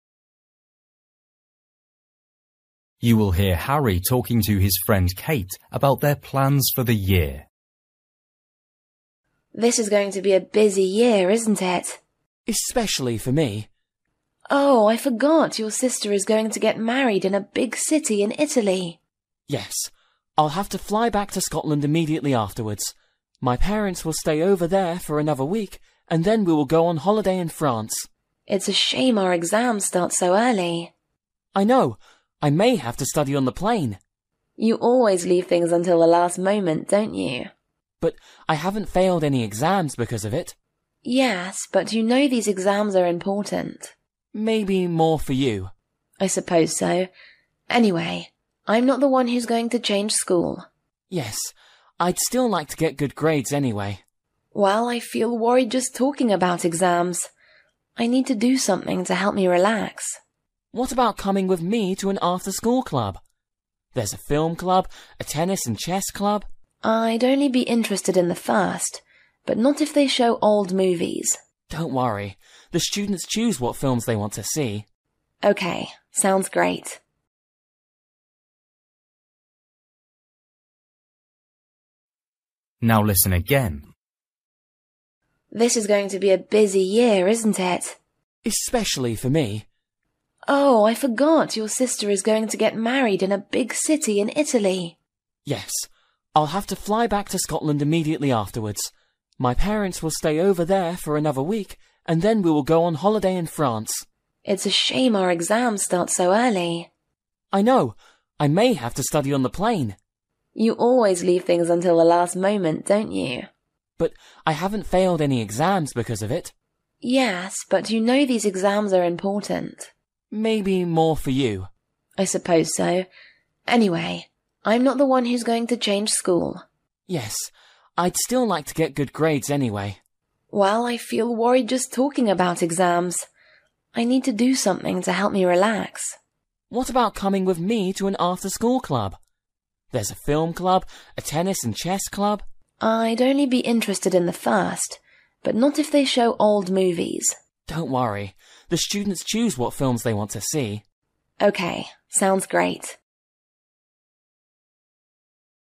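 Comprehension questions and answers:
For each question, choose the correct answer.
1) Where will Harry's sister get married?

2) The day Harry's sister gets married,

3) Harry isn't very worried about his exams because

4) What do we know about Katie?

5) What is Katie interested in?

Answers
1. in a big city in Italy
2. Harry will fly back to Scotland immediately afterwards
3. he has never failed an exam by leaving things until the last moment
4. She is going to change school
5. the film club, but not old movies

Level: Luyện nghe trình độ A2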